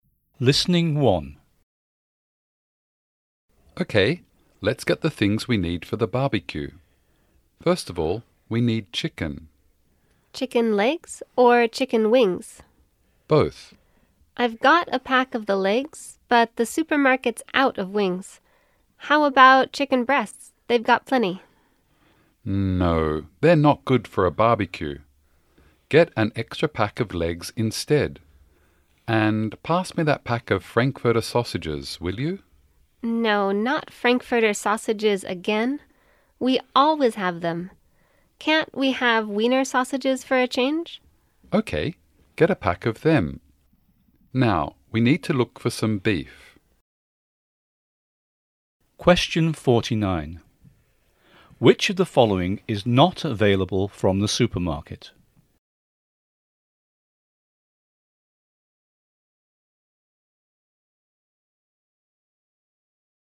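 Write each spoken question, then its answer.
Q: Which of the following is not available from the supermarket?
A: Chicken wings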